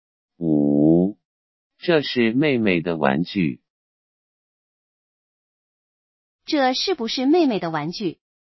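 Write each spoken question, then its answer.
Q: 这是不是妹妹的玩具?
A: 是,这是妹妹的玩具。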